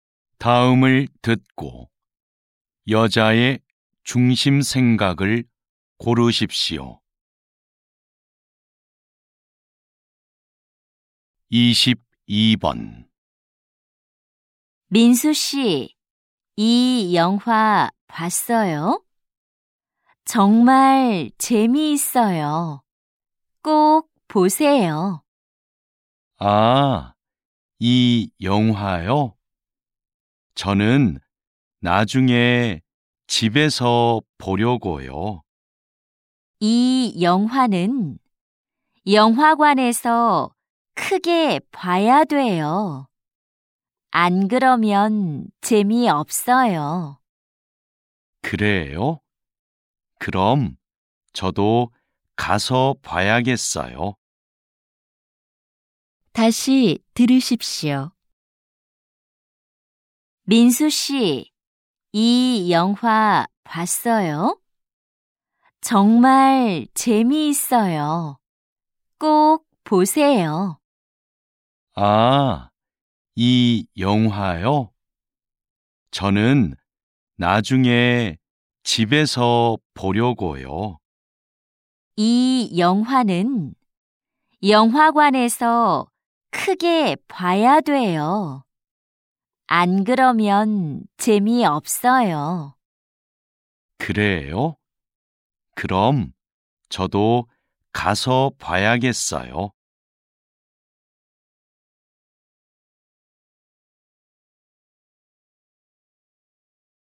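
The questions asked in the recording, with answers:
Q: 다음을 듣고 여자의 중심 생각을 고르십시오.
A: 이 영화는 영화관에서 크게 봐야 재미있다.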